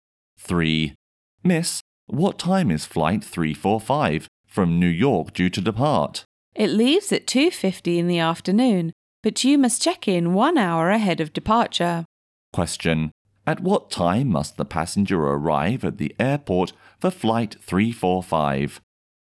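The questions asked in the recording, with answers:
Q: At what time must the passenger arrive at the airport for flight 345?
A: By 1:50 in the afternoon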